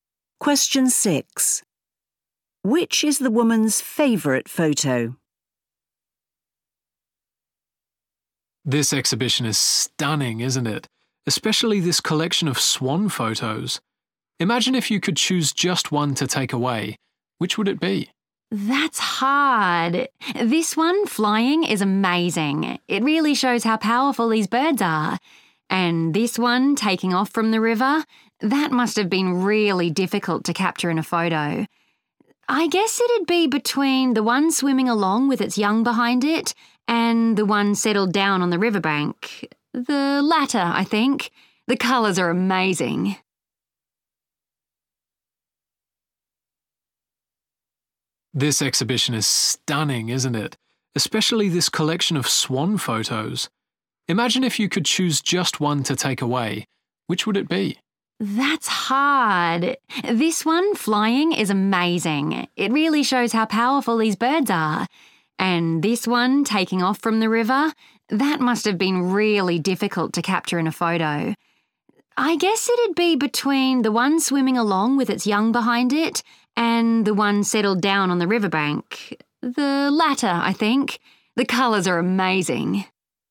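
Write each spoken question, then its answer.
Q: Which is the woman's favourite photo?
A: The swan settled down on the riverbank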